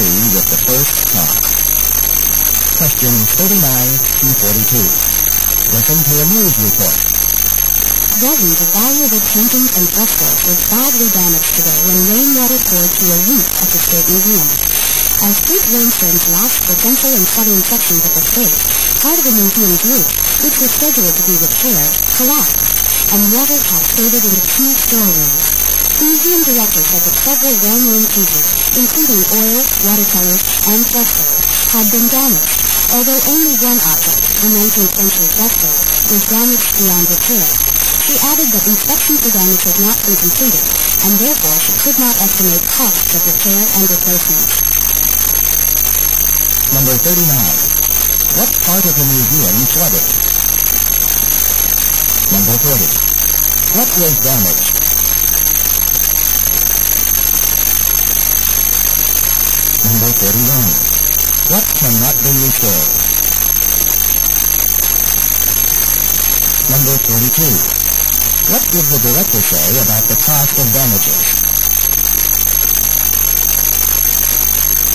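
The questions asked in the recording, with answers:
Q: What part of the museum flooded?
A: Two storerooms

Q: What was damaged?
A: Paintings and frescoes

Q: What cannot be restored?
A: A 19th-century fresco

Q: What did the director say about the cost of damages?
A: It could not be estimated yet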